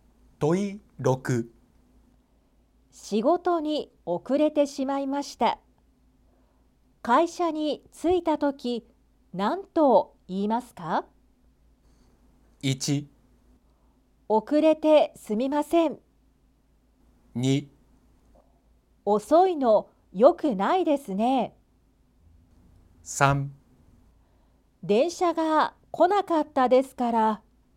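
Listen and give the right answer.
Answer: 1: 遅れてすみません。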